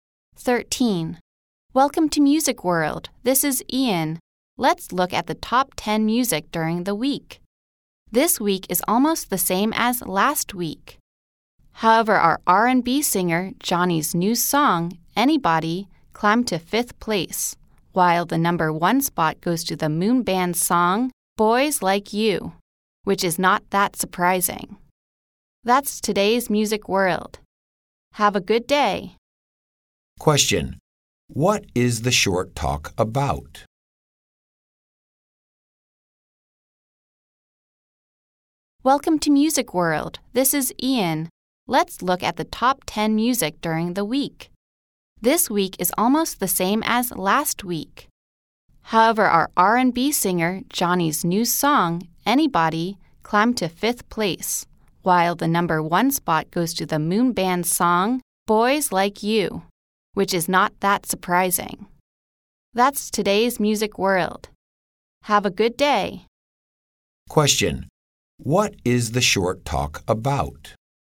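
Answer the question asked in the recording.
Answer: The top 10 music (songs) of the week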